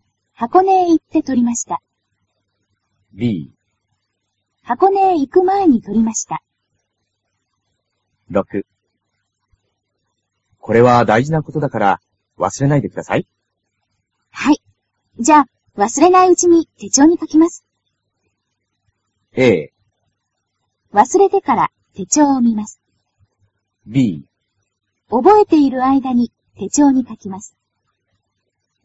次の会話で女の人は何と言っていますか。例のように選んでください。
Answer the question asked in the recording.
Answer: b

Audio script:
女:はい。じゃ、忘れないうちに、手帳に書きます。
a. 忘れてから、手帳を見ます。
b. 覚えている間に、手帳に書きます。

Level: cơ bản